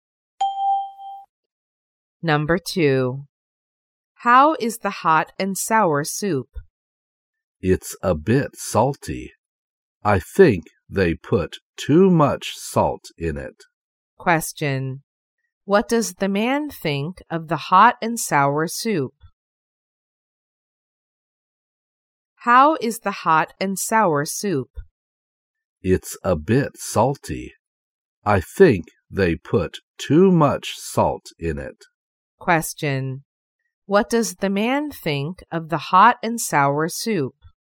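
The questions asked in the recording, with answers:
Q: What does the man think of the hot and sour soup?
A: It's a bit salty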